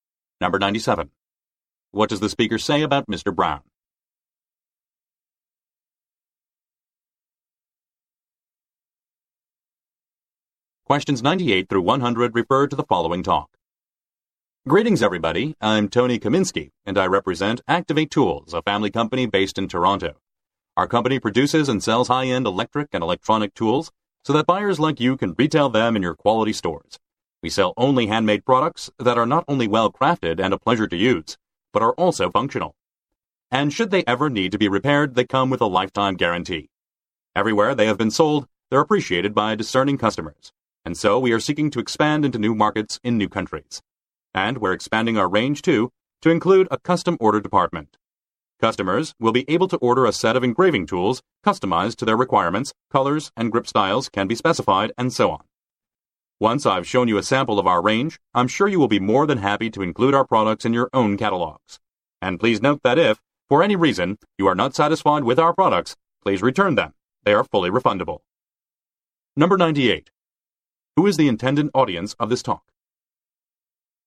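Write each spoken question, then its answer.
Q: Who is the intended audience of this talk?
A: Retail buyers for stores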